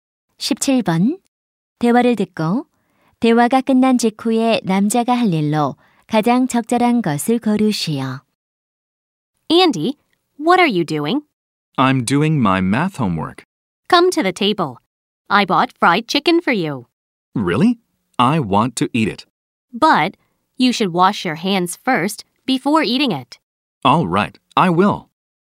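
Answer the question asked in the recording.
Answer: 손 씻기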